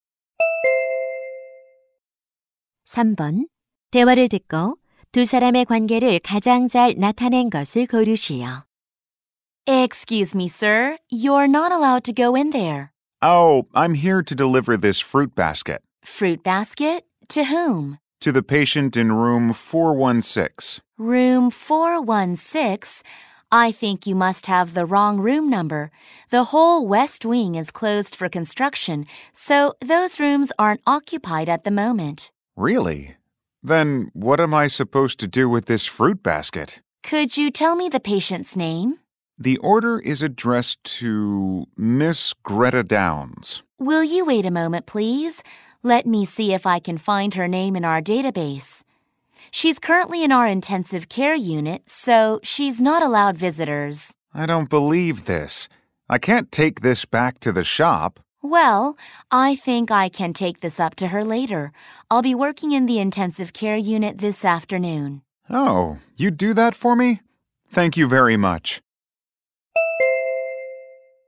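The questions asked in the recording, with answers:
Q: 대화를 듣고 두 사람의 관계를 가장 잘 나타낸 것을 고르시오.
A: 간호사 - 배달원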